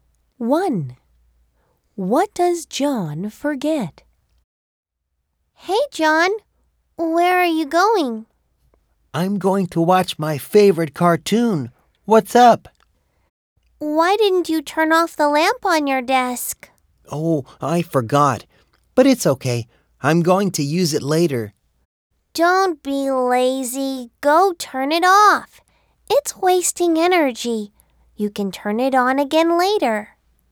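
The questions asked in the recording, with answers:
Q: What does John forget?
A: He forgets to turn off the lamp on his desk.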